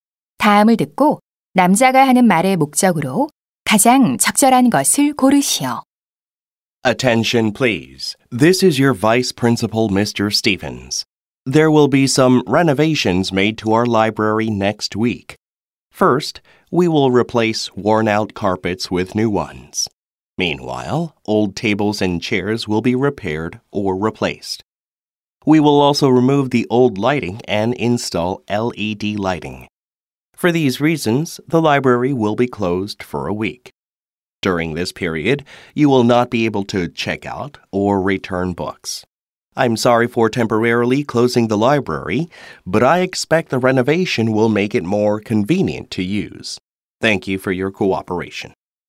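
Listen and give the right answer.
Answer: 도서관 보수 공사로 인한 임시 휴관을 안내하려고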